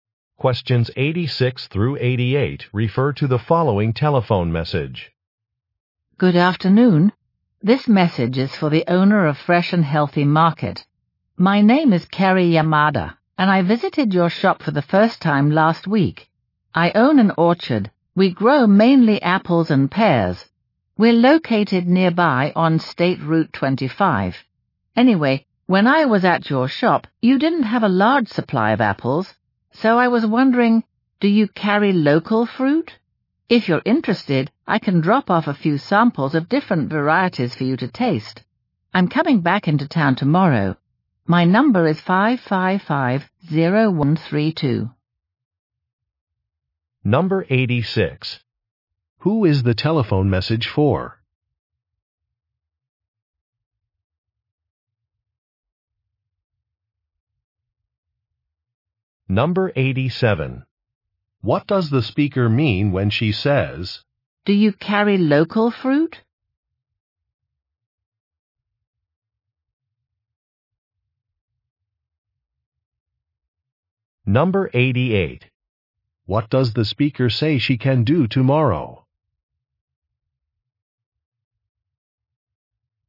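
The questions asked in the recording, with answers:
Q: Who is the telephone message for?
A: The owner of Fresh and Healthy Market

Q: What does the speaker say she can do tomorrow?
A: Drop off fruit samples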